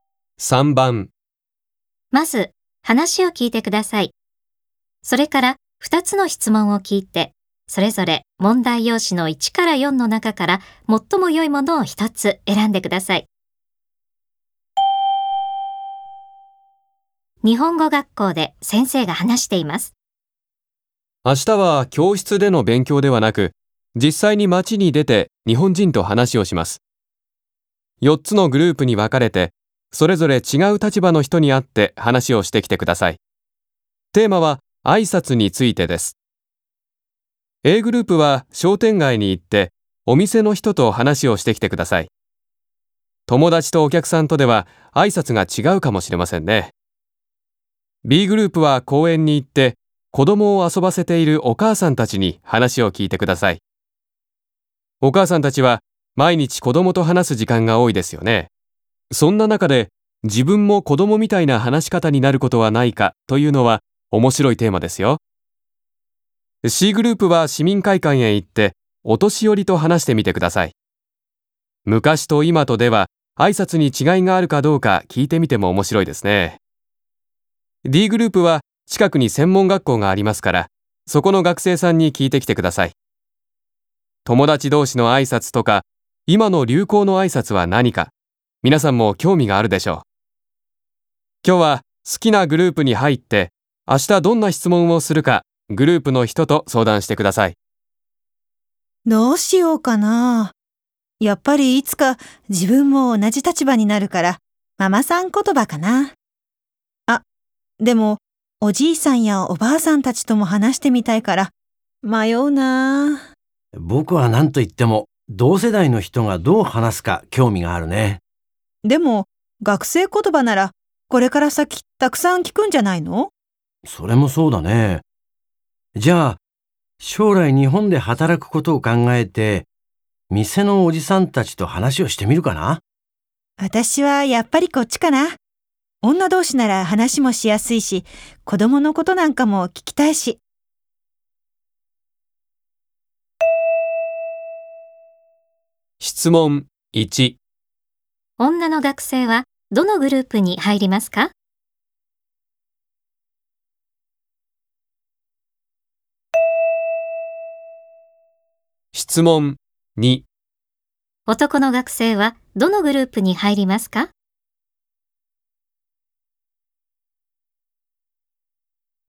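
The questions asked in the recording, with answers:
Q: 女の学生はどのグループに入りますか?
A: Bグループ(公園でお母さんたちと話す)

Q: 男の学生はどのグループに入りますか?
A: Aグループ(商店街でお店の人と話す)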